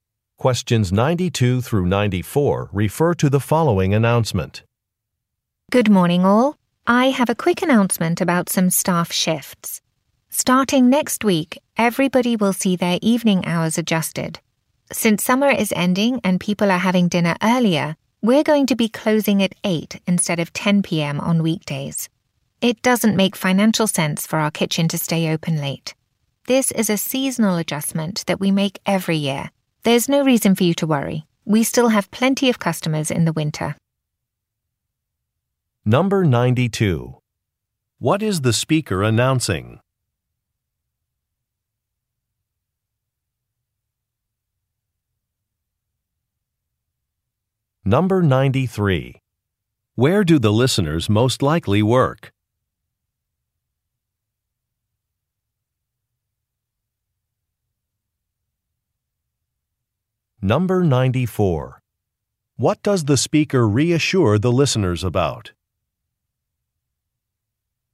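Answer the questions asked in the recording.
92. Earlier closing time / shortened evening hours
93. At a restaurant
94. There will still be plenty of customers in winter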